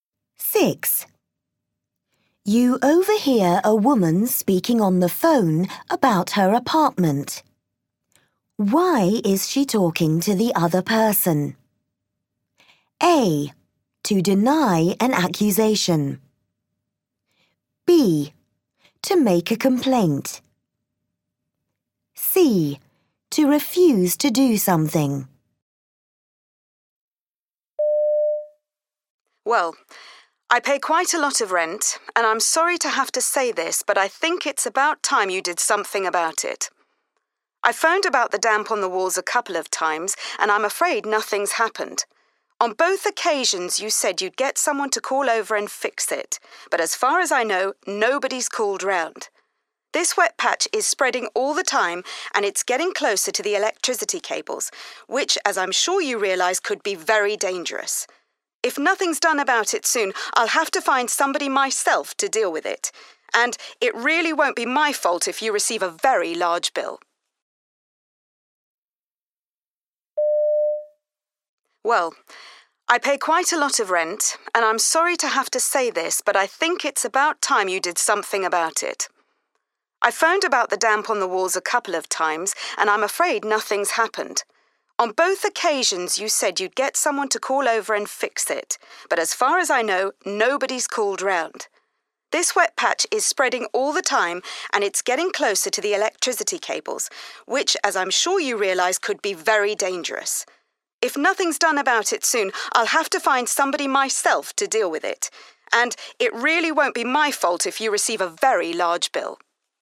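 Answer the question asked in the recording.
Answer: B: To make a complaint.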